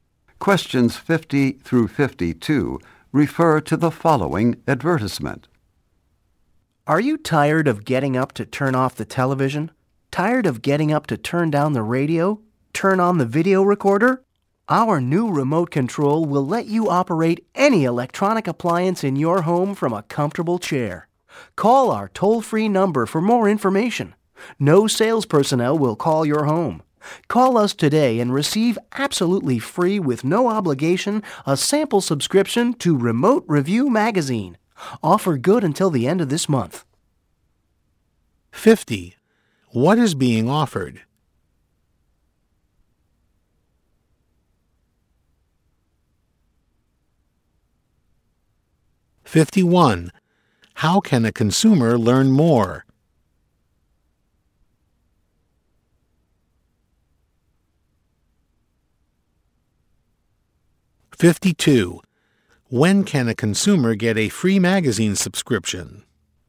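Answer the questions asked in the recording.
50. A remote control
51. By calling the toll-free number
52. Until the end of this month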